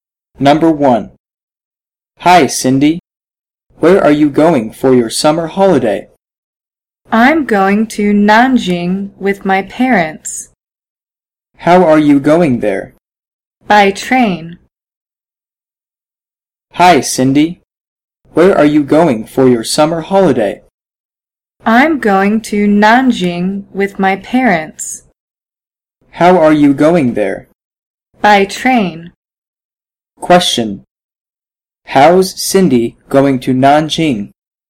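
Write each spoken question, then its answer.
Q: How's Cindy going to Nanjing?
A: By train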